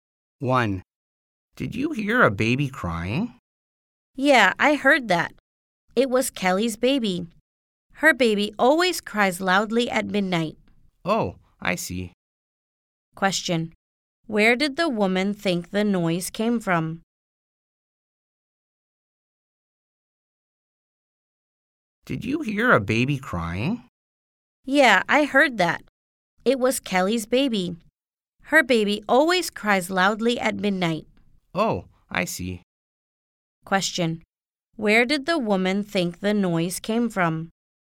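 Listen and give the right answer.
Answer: Kelly's baby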